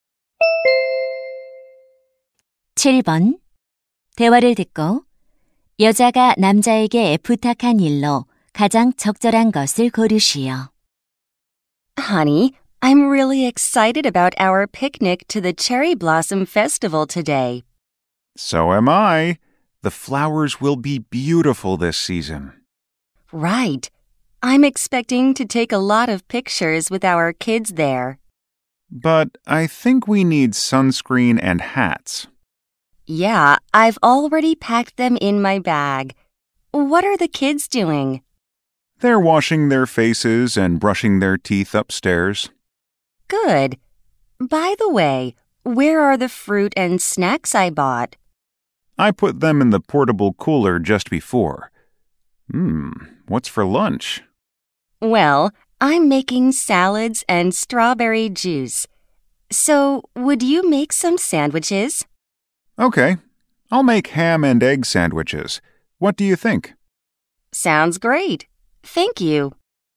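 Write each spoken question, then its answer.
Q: 대화를 듣고 여자가 남자에게 부탁한 일로 가장 적절한 것을 고르시오.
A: 샌드위치 만들기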